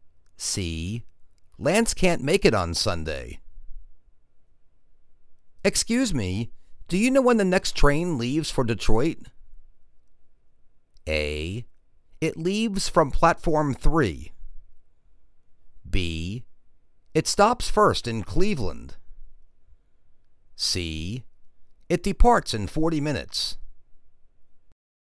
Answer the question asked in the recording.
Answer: It departs in forty minutes.